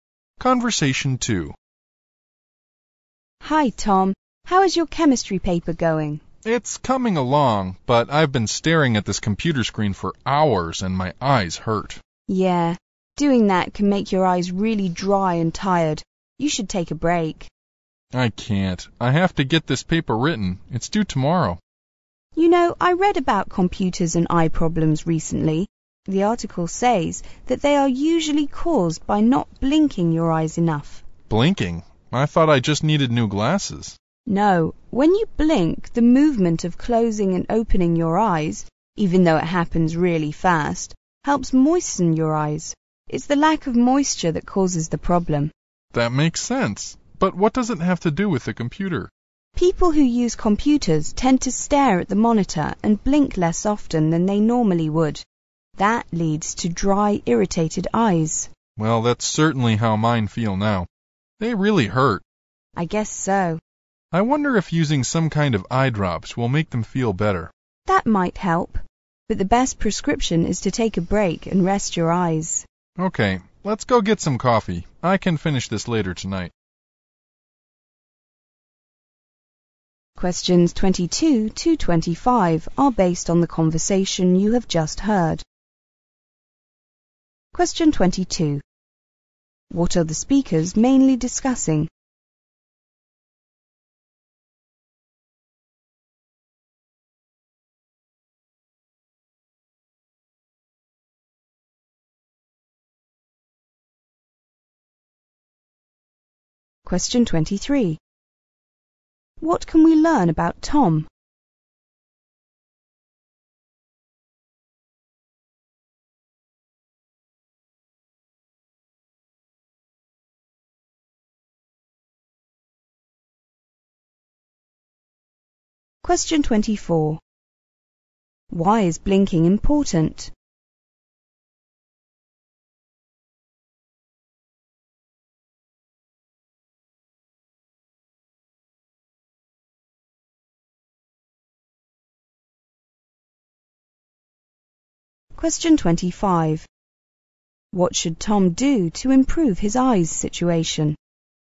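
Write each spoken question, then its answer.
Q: What are the speakers mainly discussing?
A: Eye problems caused by using computers

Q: What can we learn about Tom?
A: His eyes hurt from staring at the computer writing his chemistry paper, due tomorrow

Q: Why is blinking important?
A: It moistens the eyes

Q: What should Tom do to improve his eyes situation?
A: Take a break and rest his eyes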